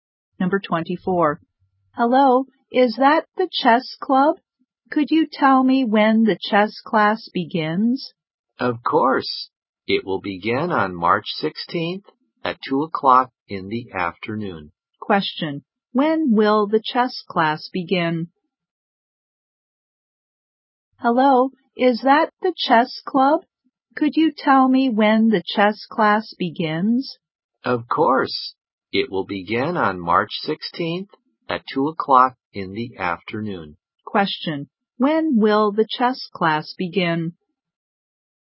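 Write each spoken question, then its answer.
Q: When will the chess class begin?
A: On March 16th at 2 o'clock in the afternoon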